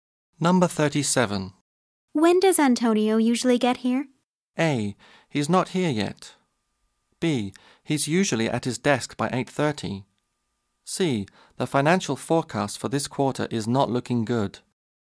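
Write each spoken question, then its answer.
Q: When does Antonio usually get here?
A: B: He's usually at his desk by 8:30.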